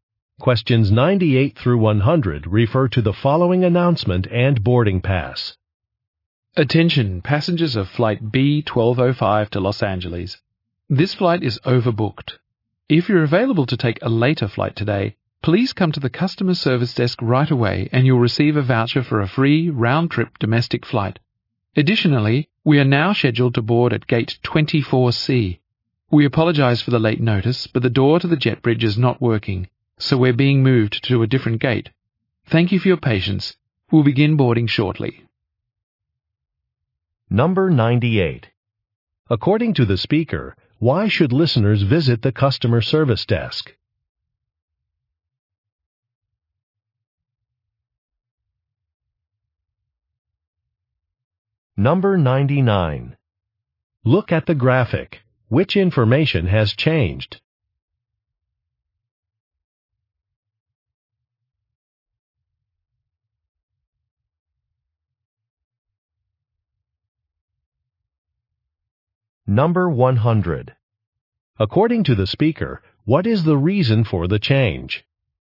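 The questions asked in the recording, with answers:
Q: According to the speaker, why should listeners visit the customer service desk?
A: To volunteer to take a later flight and get a free flight voucher

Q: According to the speaker, what is the reason for the change?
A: The jet bridge door is not working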